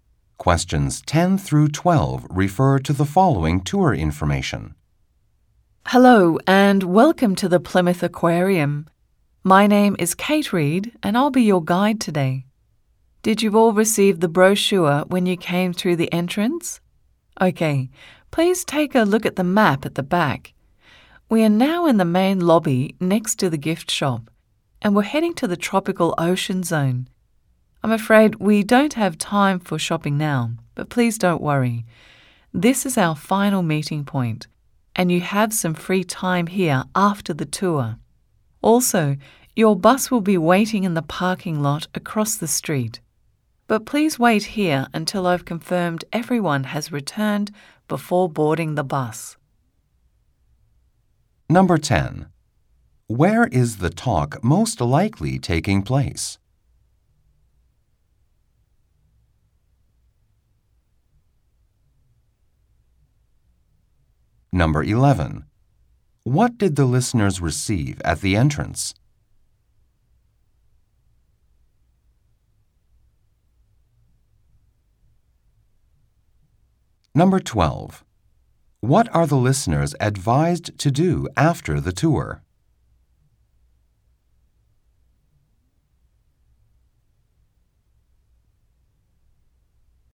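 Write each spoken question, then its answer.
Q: Where is the talk most likely taking place?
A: At an aquarium (in the main lobby of the Plymouth Aquarium)

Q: What did the listeners receive at the entrance?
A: A brochure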